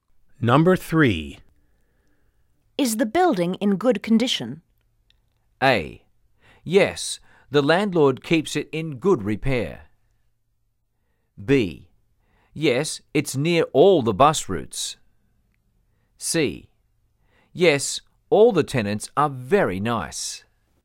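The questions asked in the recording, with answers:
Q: Is the building in good condition?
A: A: Yes, the landlord keeps it in good repair.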